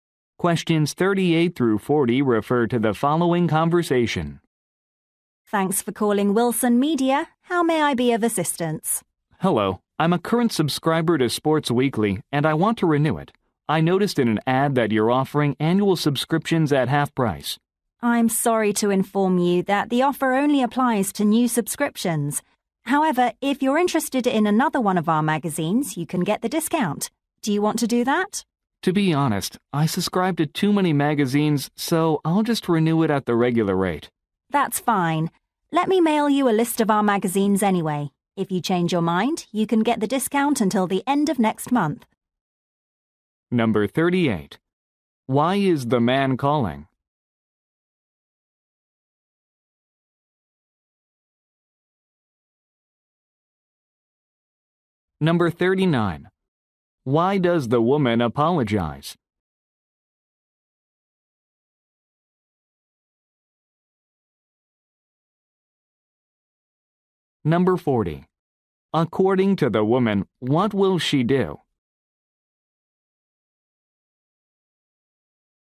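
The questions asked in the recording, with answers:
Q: Why is the man calling?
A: To renew his magazine subscription

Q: Why does the woman apologize?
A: The discount only applies to new subscriptions

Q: According to the woman, what will she do?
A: Mail him a list of magazines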